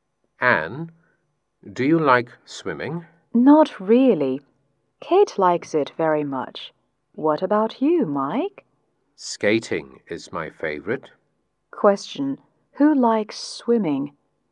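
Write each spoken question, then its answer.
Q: Question: Who likes swimming?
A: Kate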